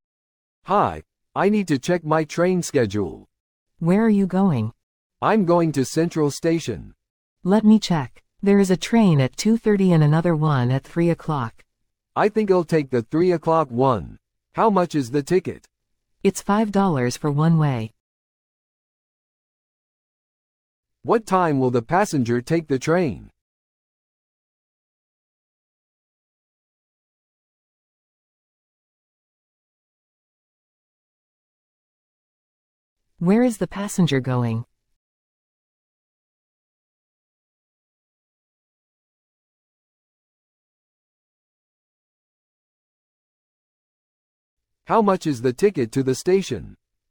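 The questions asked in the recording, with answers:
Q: What time will the passenger take the train?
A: 3 o'clock

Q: Where is the passenger going?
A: Central Station

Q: How much is the ticket to the station?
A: $5 one way

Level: 初級者用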